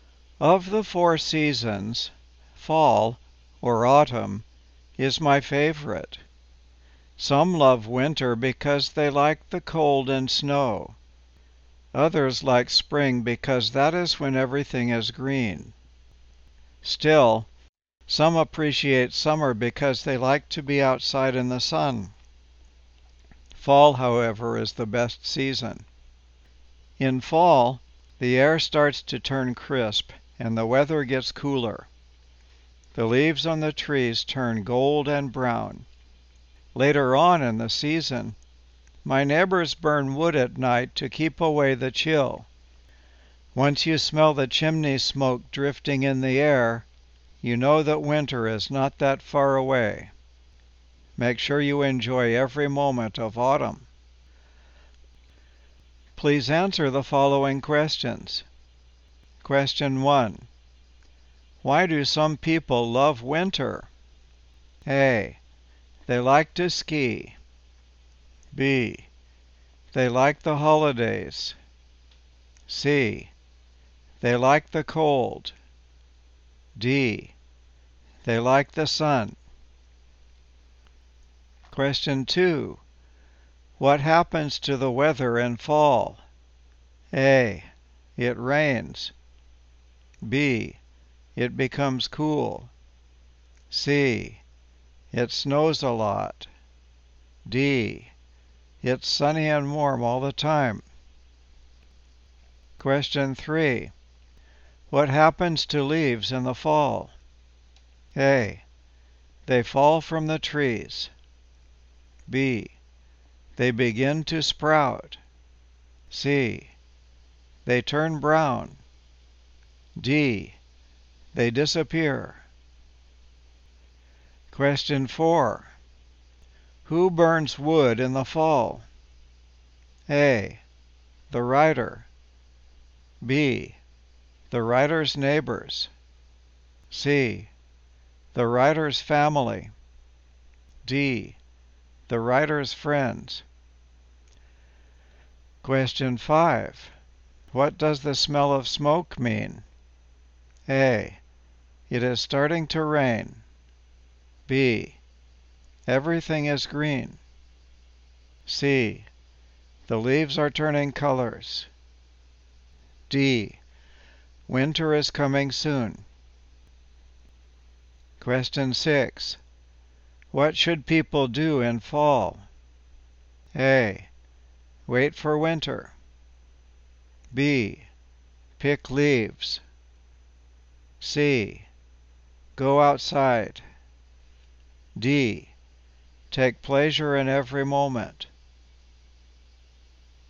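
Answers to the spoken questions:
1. C: They like the cold.
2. B: It becomes cool.
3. C: They turn brown.
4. B: The writer's neighbors.
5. D: Winter is coming soon.
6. D: Take pleasure in every moment.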